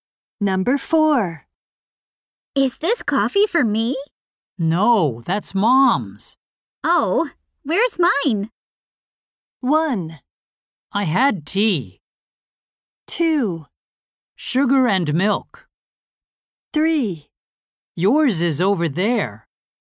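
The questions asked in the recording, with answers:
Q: Oh, where's mine?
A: 3: Yours is over there.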